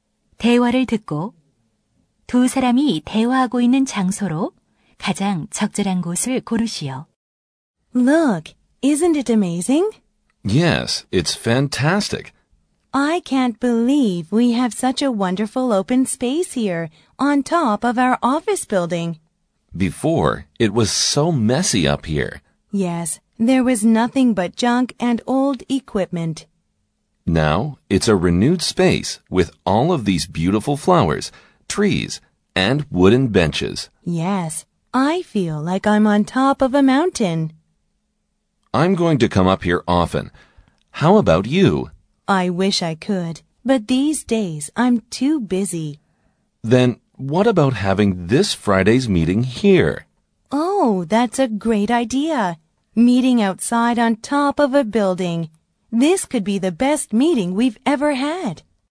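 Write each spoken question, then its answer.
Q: 대화를 듣고 두 사람이 대화하고 있는 장소로 가장 적절한 곳을 고르시오.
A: 건물 옥상 정원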